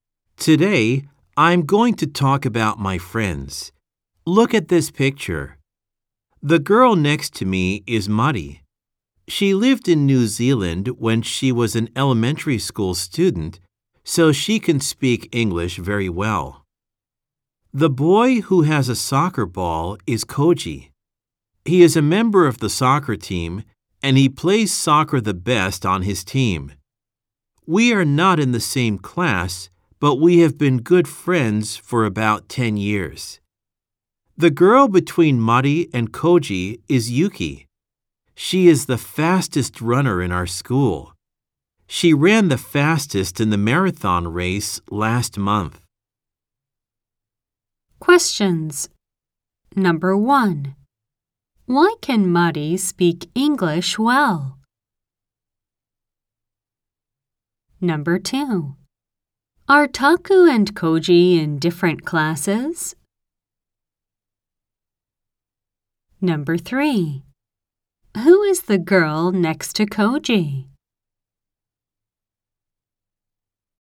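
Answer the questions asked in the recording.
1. Because she lived in New Zealand when she was an elementary school student.
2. Yes, they are.
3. Yuki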